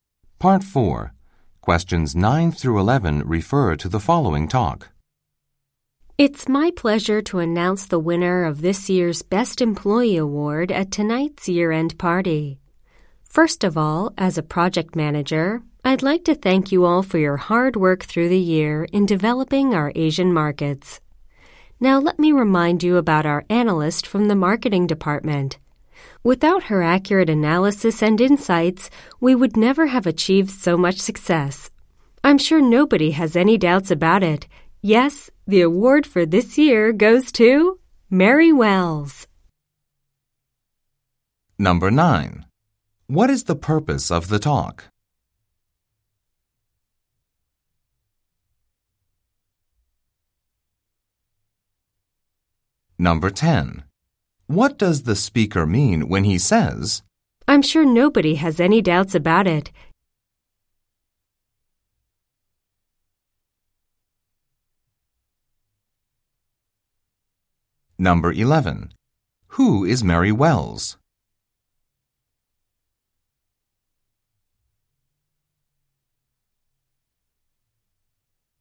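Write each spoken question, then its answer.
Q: What is the purpose of the talk?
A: To announce the winner of the Best Employee Award

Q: Who is Mary Wells?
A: An analyst in the marketing department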